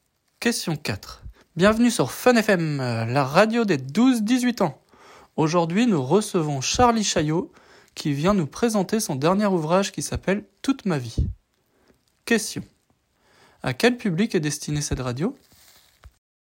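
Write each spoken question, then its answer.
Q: À quel public est destinée cette radio?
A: Aux 12-18 ans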